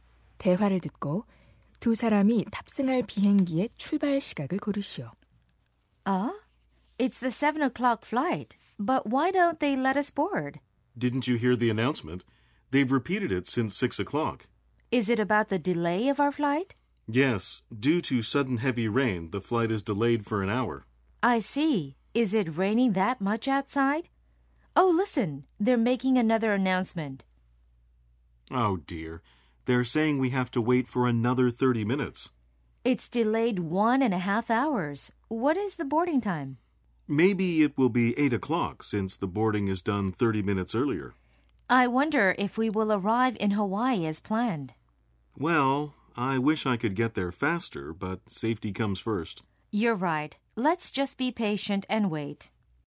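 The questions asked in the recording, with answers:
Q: 대화를 듣고 두 사람이 탑승할 비행기의 출발 시각을 고르시오.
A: 8시 30분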